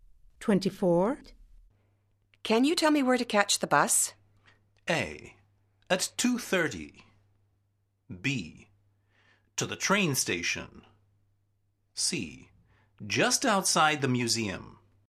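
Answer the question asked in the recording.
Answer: C: Just outside the museum.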